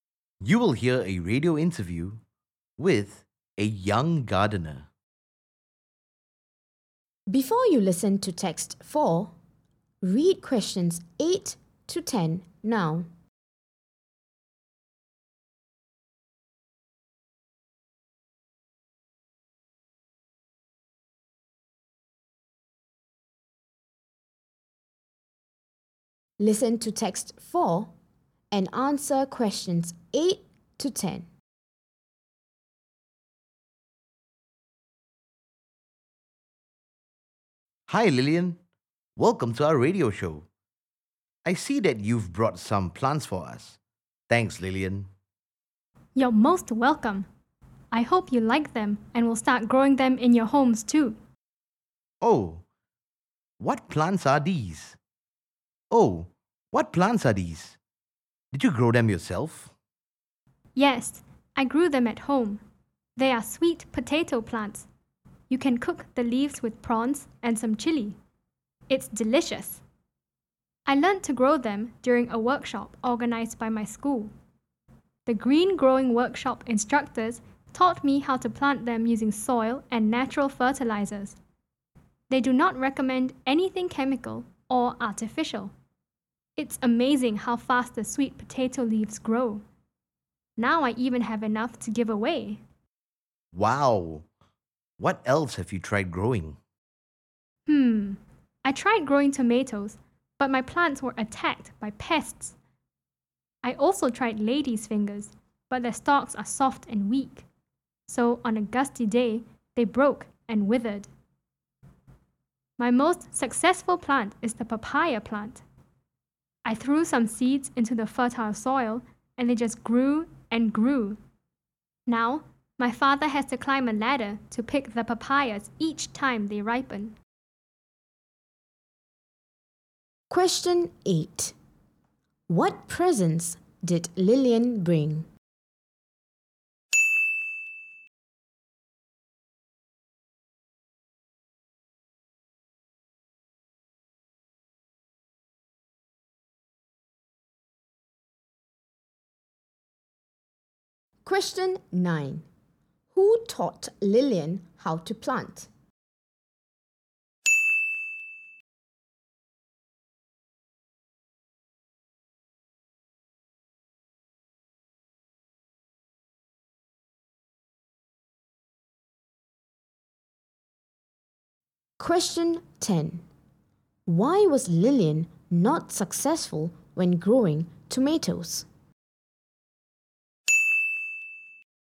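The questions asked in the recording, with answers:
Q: What presents did Lillian bring?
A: Sweet potato plants

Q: Who taught Lillian how to plant?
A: The Green Growing workshop instructors

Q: Why was Lillian not successful when growing tomatoes?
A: Her plants were attacked by pests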